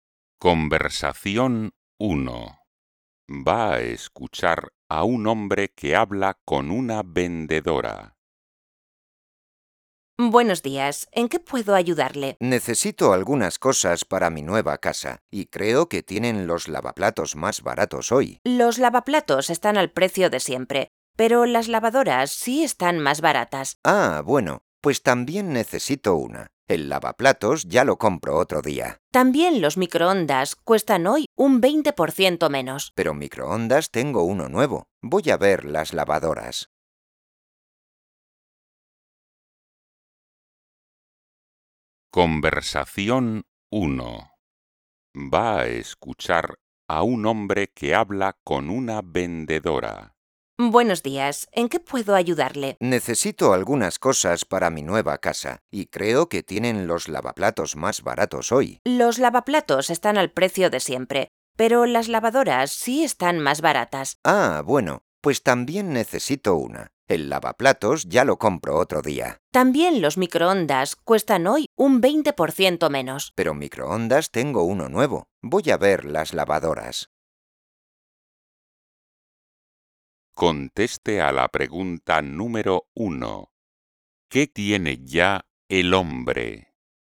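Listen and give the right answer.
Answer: un microondas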